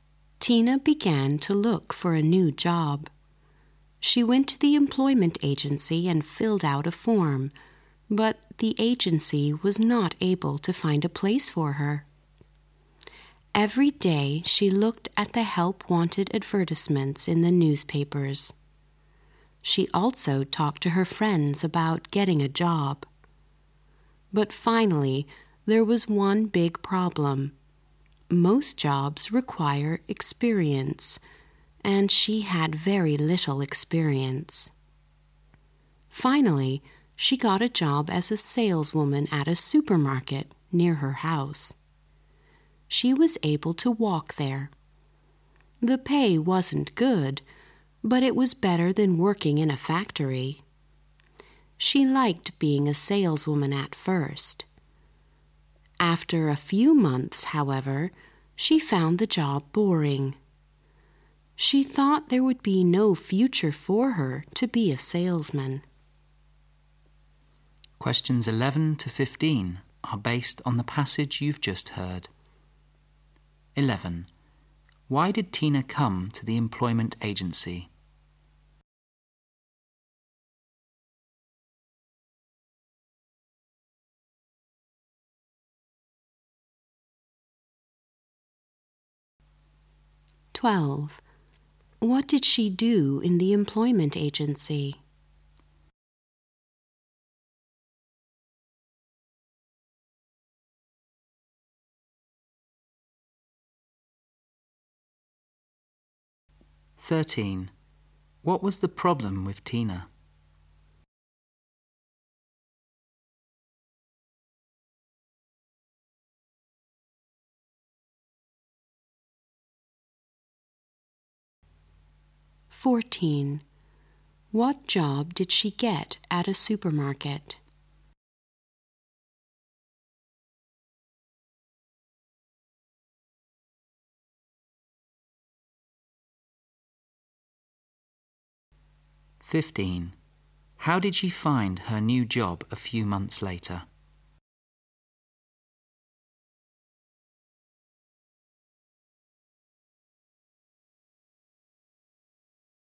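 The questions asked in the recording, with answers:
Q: Why did Tina come to the employment agency?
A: To look for a new job

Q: What did she do in the employment agency?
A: Filled out a form

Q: What was the problem with Tina?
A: She had very little experience

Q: What job did she get at a supermarket?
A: Saleswoman

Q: How did she find her new job a few months later?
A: Boring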